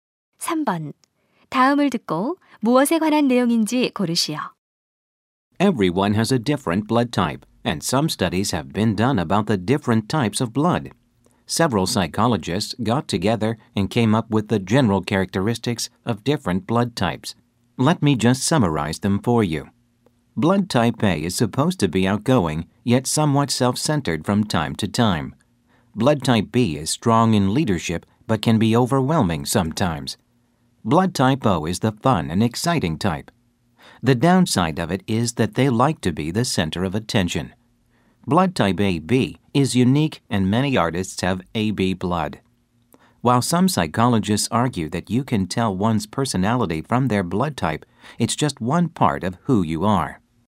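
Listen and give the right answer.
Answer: 혈액형별 성격 특성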